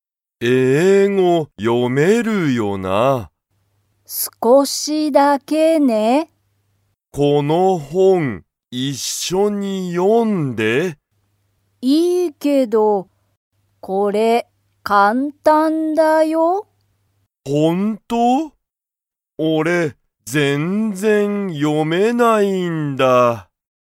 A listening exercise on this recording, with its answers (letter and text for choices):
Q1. ミカは、英語(えいご)が____読よめる。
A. よく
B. 少(すこ)しだけ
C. いつも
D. 全然(ぜんぜん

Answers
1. B. 少(すこ)しだけ

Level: Level 1